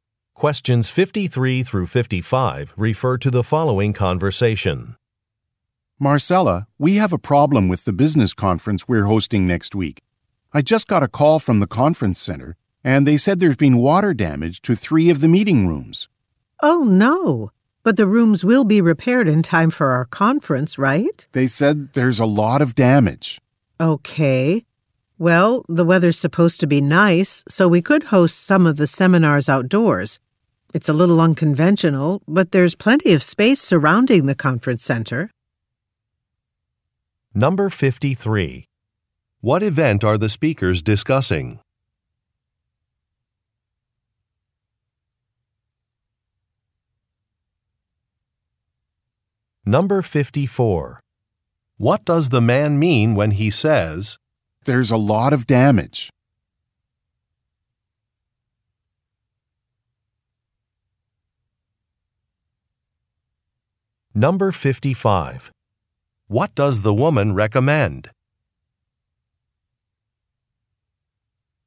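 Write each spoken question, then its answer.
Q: What event are the speakers discussing?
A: A business conference

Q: What does the man mean when he says,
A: The rooms may not be repaired in time

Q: What does the woman recommend?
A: Holding some seminars outdoors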